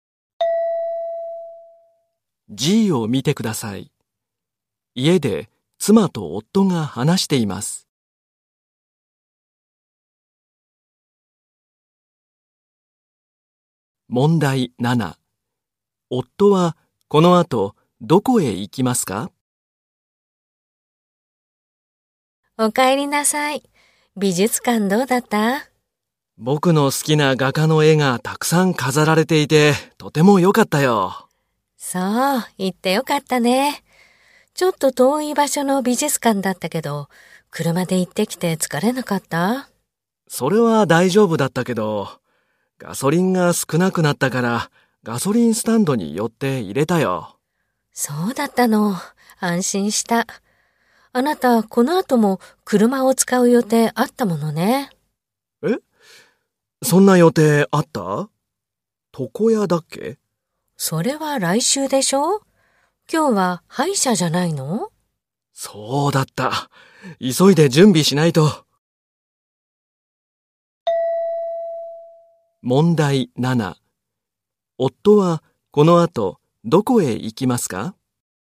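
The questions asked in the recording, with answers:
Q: 夫はこの後どこへ行きますか?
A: 歯医者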